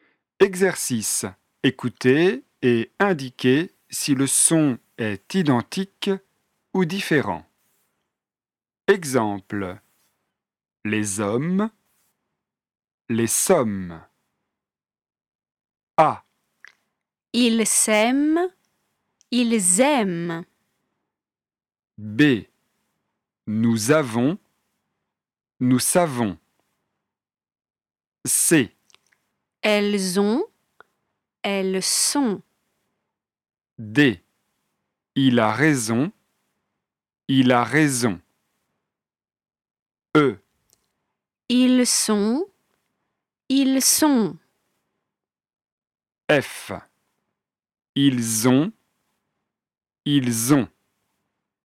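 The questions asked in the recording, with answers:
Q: Ils s'aiment. Ils aiment.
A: différent

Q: Nous avons. Nous savons.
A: différent

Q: Elles ont. Elles sont.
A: différent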